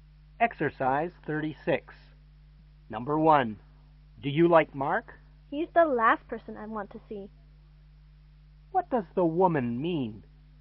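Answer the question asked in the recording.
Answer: She doesn't like Mark.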